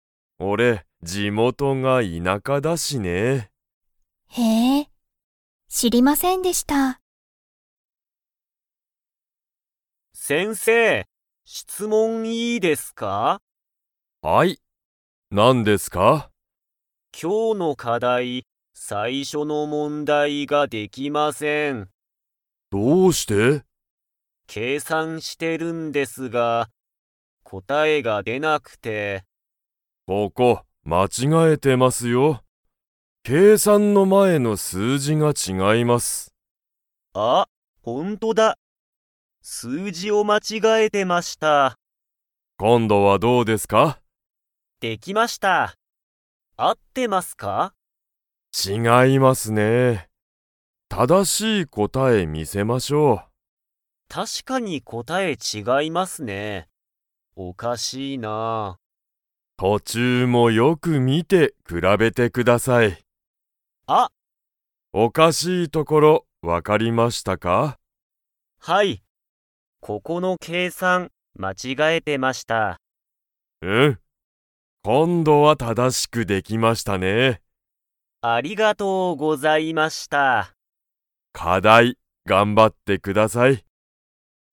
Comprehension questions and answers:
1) コウタは、計算けいさんの前まえの を間違まちがえている。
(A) 質問しつもん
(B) 課題かだい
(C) 答こたえ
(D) 数字すうじ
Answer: 数字すうじ

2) コウタは、最後さいごは正ただしく計算けいさんできましたか?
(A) はい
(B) いいえ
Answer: はい

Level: Level 4

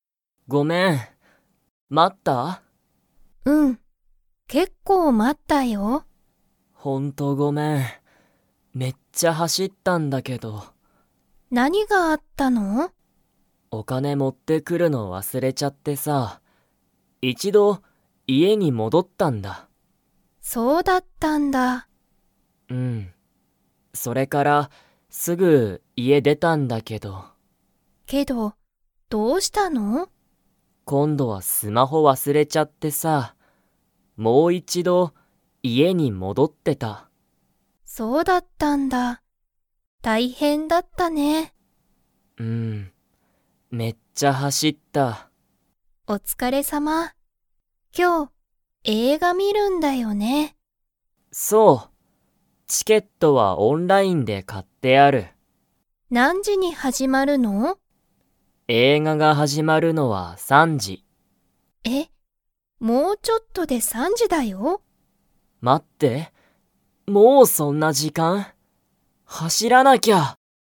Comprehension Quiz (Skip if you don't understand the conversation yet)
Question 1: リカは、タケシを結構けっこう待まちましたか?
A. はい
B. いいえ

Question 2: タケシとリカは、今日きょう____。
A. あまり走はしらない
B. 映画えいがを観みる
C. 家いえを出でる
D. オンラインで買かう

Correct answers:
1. はい
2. 映画えいがを観みる

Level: Level 2

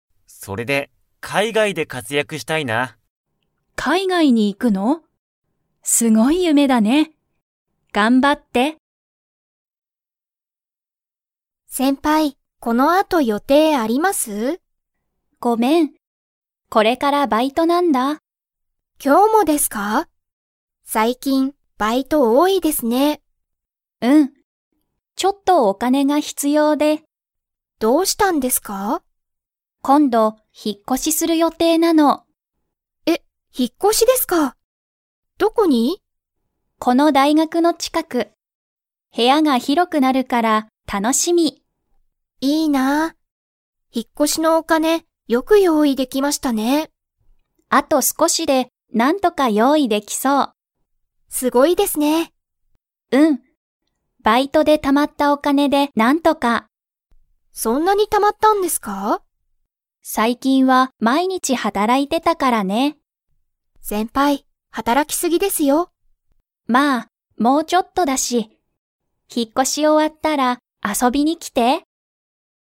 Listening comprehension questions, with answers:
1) アヤは最近さいきん、 が多おおい。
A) 引ひっ越こし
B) 買かい物もの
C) 勉強べんきょう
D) バイト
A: バイト

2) アヤの部屋へやは、引ひっ越こしたら 。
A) 広ひろくなる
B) 広ひろくならない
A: 広ひろくなる

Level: Level 4

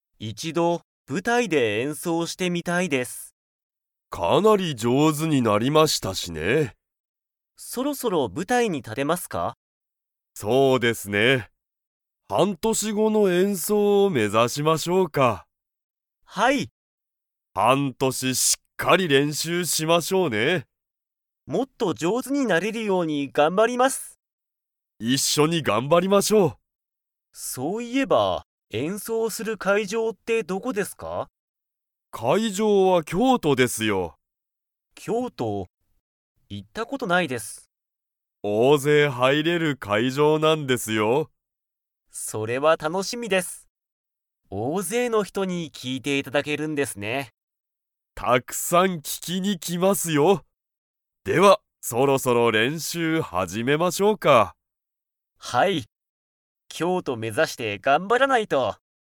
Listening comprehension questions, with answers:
Comprehension Quiz (Skip if you don't understand the conversation yet)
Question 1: 生徒せいとは、何年なんねん後ごの演奏えんそうを目指めざしますか?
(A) 半年はんとし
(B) 一年いちねん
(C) 二年にねん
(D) 三年さんねん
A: 半年はんとし

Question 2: 京都きょうとの会場かいじょうには、大勢おおぜい 。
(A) 入はいれる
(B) 入はいれない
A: 入はいれる

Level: Level 4

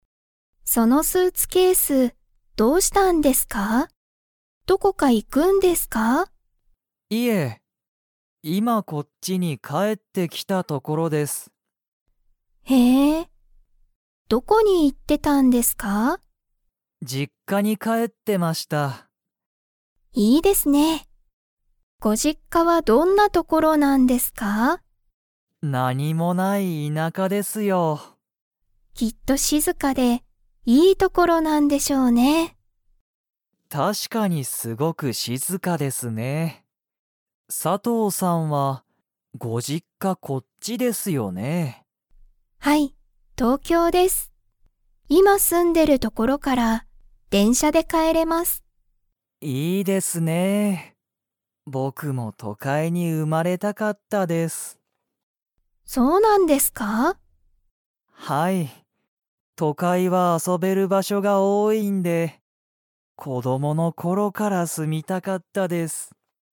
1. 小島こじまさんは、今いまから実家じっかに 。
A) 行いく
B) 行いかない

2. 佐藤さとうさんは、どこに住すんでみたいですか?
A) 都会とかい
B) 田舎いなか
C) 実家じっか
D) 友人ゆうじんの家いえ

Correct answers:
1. 行いかない
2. 田舎いなか

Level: Level 4

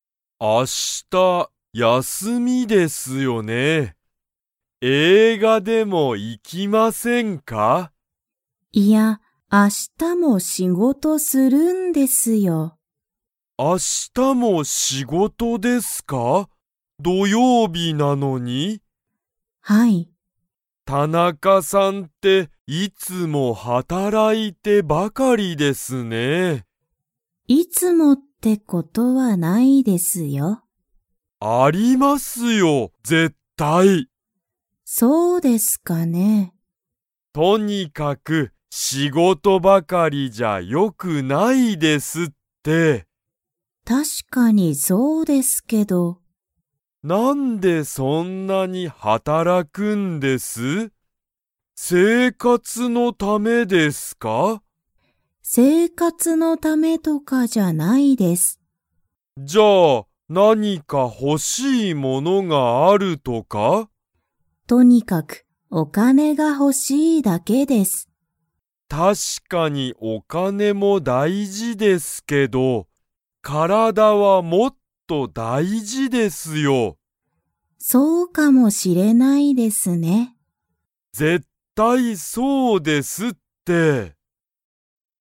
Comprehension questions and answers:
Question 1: 佐藤(さとう)さんと田中(たなか)さんは、明日(あした)、映画(えいが)に行(い)きますか?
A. はい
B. いいえ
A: いいえ

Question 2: 田中(たなか)さんは、とにかく____が欲(ほ)しい。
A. お金(かね)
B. 休(やす)み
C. 生活(せいかつ)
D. 体(からだ)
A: お金(かね)

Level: Level 2

